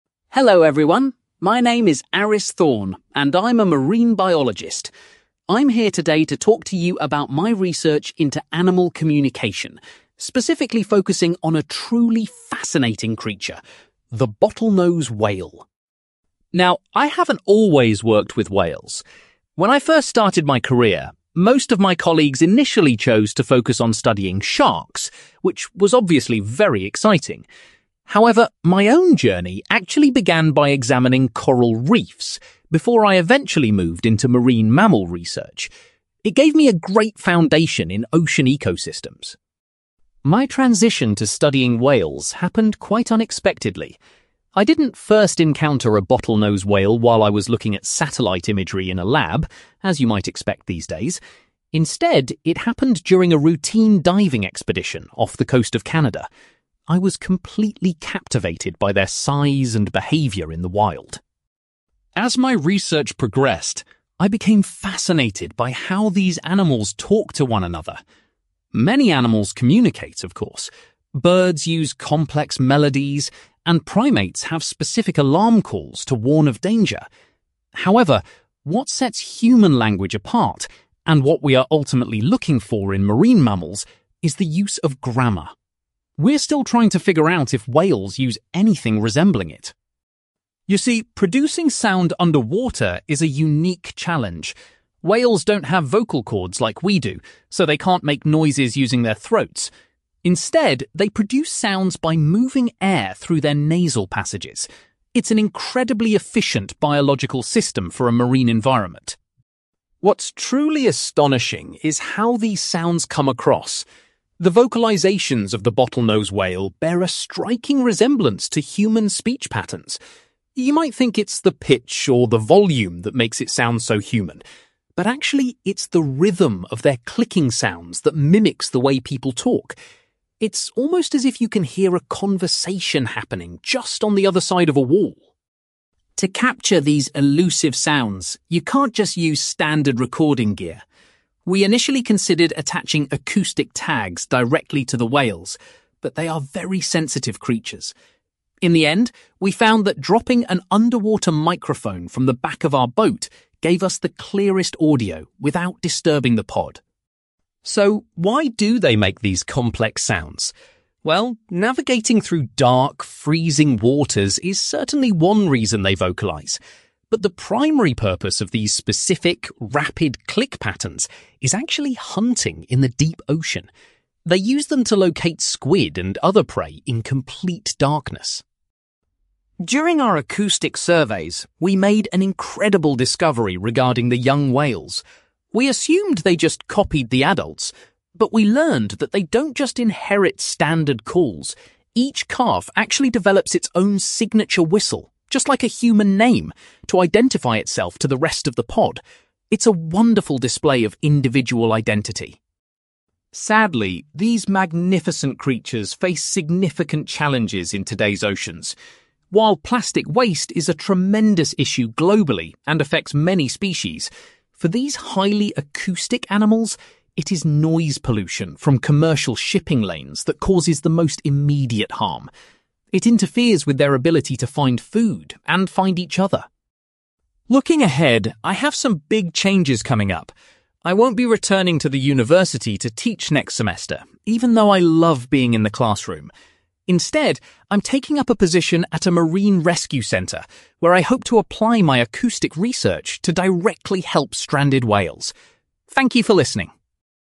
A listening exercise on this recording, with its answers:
You will hear a marine biologist called Aris Thorne giving a presentation about his research into bottlenose whales. For questions 9-18, complete the sentences with a word or short phrase.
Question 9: Before focusing on marine mammals, Aris studied (9)........................... .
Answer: coral reefs

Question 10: Aris was doing some (10)........................... when he first saw a bottlenose whale.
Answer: diving

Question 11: Aris explains that the presence of (11)........................... is the main difference between basic animal sounds and human language.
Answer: grammar

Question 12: Bottlenose whales create sounds by forcing air through their (12)........................... rather than vocal cords.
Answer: nasal passages

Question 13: Aris points out that it is the (13)........................... of the whale's calls that makes them sound like human speech.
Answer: rhythm

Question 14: Aris's team used an (14)........................... to record the sounds made by the whales.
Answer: underwater microphone

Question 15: The complex clicking sounds are mainly used by the whales for (15)........................... in dark water.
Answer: hunting

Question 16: Aris was amazed to learn that each young whale creates a unique (16)........................... to identify itself.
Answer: signature whistle

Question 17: Aris is particularly concerned about the impact of (17)........................... on the whales' ability to communicate.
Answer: noise pollution

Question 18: In the future, Aris is going to work at a (18)........................... to help stranded marine mammals.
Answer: rescue center

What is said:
Aris: Hello everyone, my name is Aris Thorne, and I'm a marine biologist. I'm here today to talk to you about my research into animal communication, specifically focusing on a truly fascinating creature: the bottlenose whale.
Now, I haven't always worked with whales. When I first started my career, most of my colleagues initially chose to focus on studying sharks, which was obviously very exciting. However, my own journey actually began by examining coral reefs, before I eventually moved into marine mammal research. It gave me a great foundation in ocean ecosystems.
My transition to studying whales happened quite unexpectedly. I didn't first encounter a bottlenose whale while I was looking at satellite imagery in a lab, as you might expect these days. Instead, it happened during a routine diving expedition off the coast of Canada. I was completely captivated by their size and behavior in the wild.
As my research progressed, I became fascinated by how these animals talk to one another. Many animals communicate, of course. Birds use complex melodies, and primates have specific alarm calls to warn of danger. However, what sets human language apart, and what we are ultimately looking for in marine mammals, is the use of grammar. We're still trying to figure out if whales use anything resembling it.
You see, producing sound underwater is a unique challenge. Whales don't have vocal cords like we do, so they can't make noises using their throats. Instead, they produce sounds by moving air through their nasal passages. It's an incredibly efficient biological system for a marine environment.
What's truly astonishing is how these sounds come across. The vocalizations of the bottlenose whale bear a striking resemblance to human speech patterns. You might think it's the pitch or the volume that makes it sound so human. But actually, it's the rhythm of their clicking sounds that mimics the way people talk. It's almost as if you can hear a conversation happening just on the other side of a wall.
To capture these elusive sounds, you can't just use standard recording gear. We initially considered attaching acoustic tags directly to the whales, but they are very sensitive creatures. In the end, we found that dropping an underwater microphone from the back of our boat gave us the clearest audio without disturbing the pod.
So, why do they make these complex sounds? Well, navigating through dark, freezing waters is certainly one reason they vocalize. But the primary purpose of these specific, rapid click patterns is actually hunting in the deep ocean. They use them to locate squid and other prey in complete darkness.
During our acoustic surveys, we made an incredible discovery regarding the young whales. We assumed they just copied the adults. But we learned that they don't just inherit standard calls; each calf actually develops its own signature whistle, just like a human name, to identify itself to the rest of the pod. It's a wonderful display of individual identity.
Sadly, these magnificent creatures face significant challenges in today's oceans. While plastic waste is a tremendous issue globally and affects many species, for these highly acoustic animals, it is noise pollution from commercial shipping lanes that causes the most immediate harm. It interferes with their ability to find food and find each other.
Looking ahead, I have some big changes coming up. I won't be returning to the university to teach next semester, even though I love being in the classroom. Instead, I'm taking up a position at a marine rescue center, where I hope to apply my acoustic research to directly help stranded whales. Thank you for listening!

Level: B2